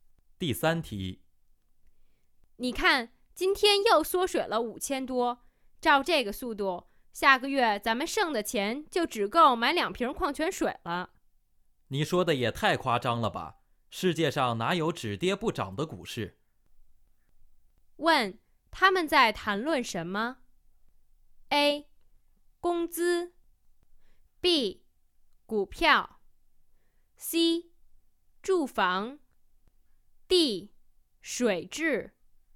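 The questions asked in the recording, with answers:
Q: 问,他们在谈论什么?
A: B: 股票。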